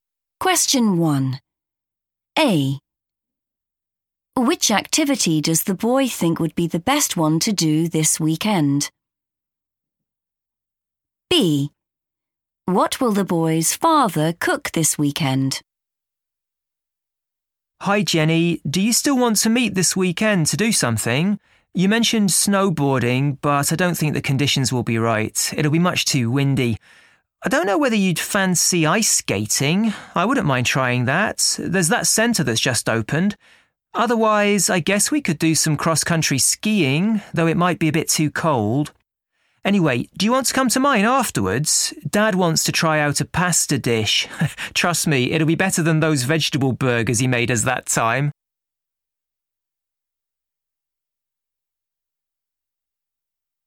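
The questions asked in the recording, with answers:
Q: Which activity does the boy think would be the best one to do this weekend?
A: ice skating

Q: What will the boy's father cook this weekend?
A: a pasta dish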